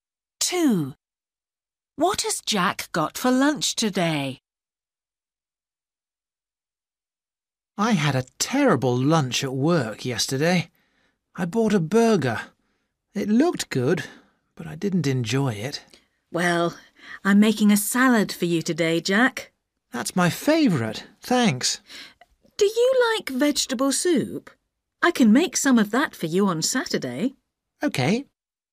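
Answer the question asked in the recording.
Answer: A salad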